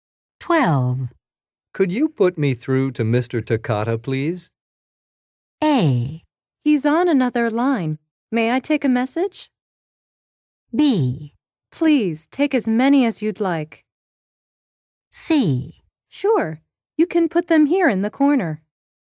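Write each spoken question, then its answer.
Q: Could you put me through to Mr. Takata, please?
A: A: He's on another line. May I take a message?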